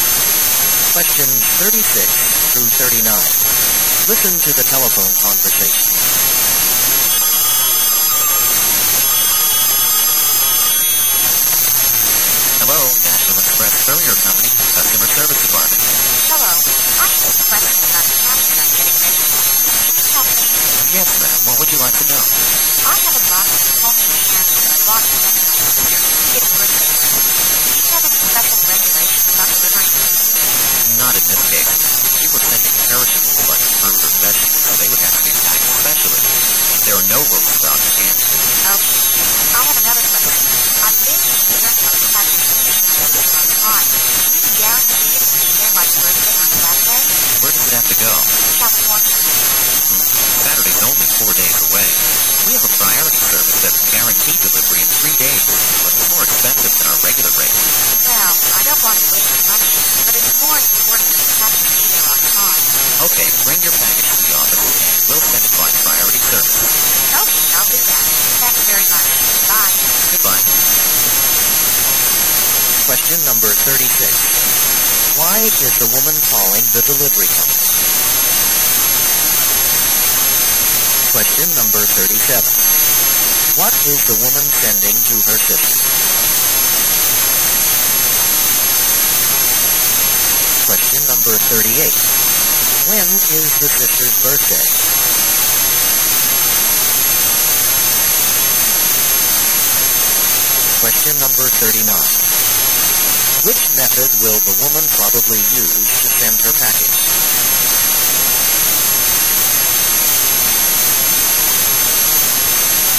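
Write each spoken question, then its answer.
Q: Why is the woman calling the delivery company?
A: To ask about sending a food package on time

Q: When is the sister's birthday?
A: Saturday

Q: Which method will the woman probably use to send her package?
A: Priority service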